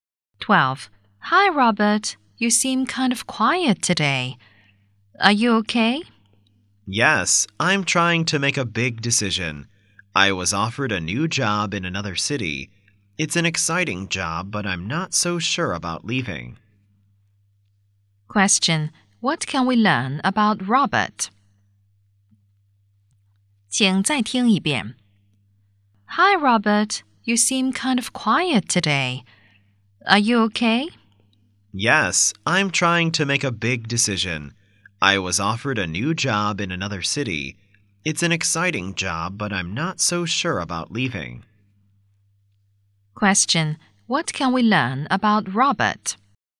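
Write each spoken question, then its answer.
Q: Question: What can we learn about Robert?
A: He has been offered a new job in another city and isn't sure about leaving.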